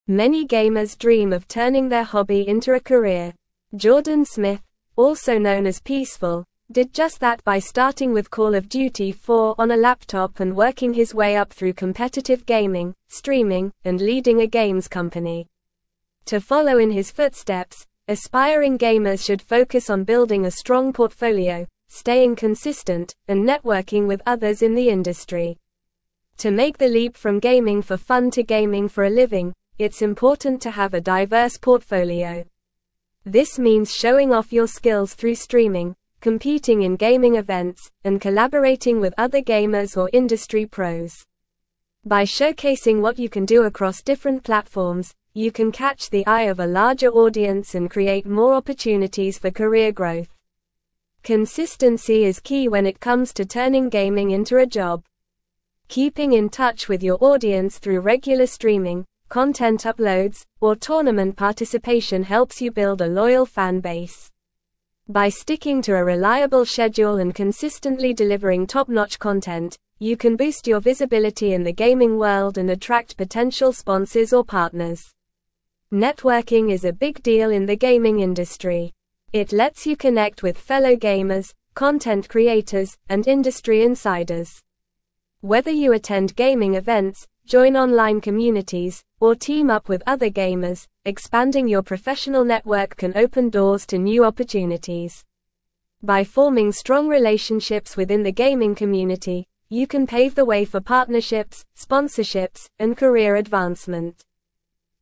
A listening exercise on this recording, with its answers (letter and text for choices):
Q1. Many gamers dream of (1)______ their (2)______ into a career.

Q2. Many gamers dream of (1)______ their (2)______ into a career.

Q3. Jordan (3)______, also known as Peeceful, did just that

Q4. working his way up through (4)______ gaming, streaming, and leading a games company.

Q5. This means (6)______ off your skills through streaming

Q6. By showcasing what you can do across (7)______ platforms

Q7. you can catch the eye of a (8)______ audience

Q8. Keeping in touch with your audience through (9)______ streaming, content (10)______, or tournament participation helps you build a loyal fan base.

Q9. Keeping in touch with your audience through (9)______ streaming, content (10)______, or tournament participation helps you build a loyal fan base.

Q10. By (11)______ to a reliable schedule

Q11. attract (12)______ sponsors or partners.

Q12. It lets you connect with fellow (13)______, content creators, and industry insiders.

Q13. expanding your professional network can open (14)______ to new opportunities.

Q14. By (15)______ strong relationships within the gaming community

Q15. you can pave the way for partnerships, (16)______, and career advancement.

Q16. How did Jordan Smith, also known as Peeceful, start his gaming career?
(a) By competing in a chess tournament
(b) By playing Call of Duty 4 on a laptop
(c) By watching gaming videos on YouTube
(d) By reading books about gaming history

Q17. What is one important tip for aspiring gamers mentioned in the article?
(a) Ignoring networking opportunities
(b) Playing games sporadically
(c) Avoiding consistency in content creation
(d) Building a strong portfolio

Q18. How can gamers showcase their skills to a larger audience?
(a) By playing games alone at home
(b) By avoiding social media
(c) By never participating in gaming events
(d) Through streaming, competing, and collaborating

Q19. What is emphasized as key to turning gaming into a job?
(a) Randomness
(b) Consistency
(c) Isolation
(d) Lack of communication with the audience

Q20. How can gamers build a loyal fan base?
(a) By keeping in touch with their audience regularly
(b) By never interacting with their fans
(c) By changing their schedule often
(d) By delivering low-quality content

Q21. What is highlighted as a crucial aspect of advancing in the gaming industry?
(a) Avoiding connections with others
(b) Staying in isolation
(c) Networking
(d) Refusing to attend gaming events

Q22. How can networking benefit gamers?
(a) By limiting their career growth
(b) By avoiding collaborations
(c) By opening doors to new opportunities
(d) By never interacting with other gamers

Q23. What can forming strong relationships within the gaming community lead to?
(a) Partnerships, sponsorships, and career advancement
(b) Isolation and lack of opportunities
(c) Decreased visibility in the industry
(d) Stagnation in career growth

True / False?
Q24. Having a limited portfolio in gaming involves hiding your skills through streaming, avoiding events, and avoiding collaborating with other gamers or industry professionals.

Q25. Networking is unimportant in the gaming industry to disconnect from fellow gamers, content creators, and industry insiders to miss out on new opportunities.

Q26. Destroying relationships within the gaming community can lead to missed partnerships, sponsorships, and career advancement opportunities.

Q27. By changing your schedule frequently and delivering mediocre content, gamers can repel potential sponsors or partners in the industry.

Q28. Jordan Smith, also known as Peeceful, turned his gaming hobby into a career starting with Call of Duty 4 on a laptop.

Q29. Attending gaming events, joining online communities, and teaming up with other gamers can help expand your professional network in the gaming industry.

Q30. Being consistent in gaming by regularly streaming, uploading content, or participating in tournaments helps build a loyal fan base and increases visibility in the gaming world.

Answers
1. turning
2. hobby
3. Smith
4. competitive
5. showing
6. different
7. larger
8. regular
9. uploads
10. sticking
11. potential
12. gamers
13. doors
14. forming
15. sponsorships
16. (b) By playing Call of Duty 4 on a laptop
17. (d) Building a strong portfolio
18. (d) Through streaming, competing, and collaborating
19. (b) Consistency
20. (a) By keeping in touch with their audience regularly
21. (c) Networking
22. (c) By opening doors to new opportunities
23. (a) Partnerships, sponsorships, and career advancement
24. False
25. False
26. False
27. False
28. True
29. True
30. True

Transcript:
Many gamers dream of turning their hobby into a career. Jordan Smith, also known as Peeceful, did just that by starting with Call of Duty 4 on a laptop and working his way up through competitive gaming, streaming, and leading a games company. To follow in his footsteps, aspiring gamers should focus on building a strong portfolio, staying consistent, and networking with others in the industry.
To make the leap from gaming for fun to gaming for a living, it's important to have a diverse portfolio. This means showing off your skills through streaming, competing in gaming events, and collaborating with other gamers or industry pros. By showcasing what you can do across different platforms, you can catch the eye of a larger audience and create more opportunities for career growth.
Consistency is key when it comes to turning gaming into a job. Keeping in touch with your audience through regular streaming, content uploads, or tournament participation helps you build a loyal fan base. By sticking to a reliable schedule and consistently delivering top-notch content, you can boost your visibility in the gaming world and attract potential sponsors or partners.
Networking is a big deal in the gaming industry. It lets you connect with fellow gamers, content creators, and industry insiders. Whether you attend gaming events, join online communities, or team up with other gamers, expanding your professional network can open doors to new opportunities. By forming strong relationships within the gaming community, you can pave the way for partnerships, sponsorships, and career advancement.

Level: Level 3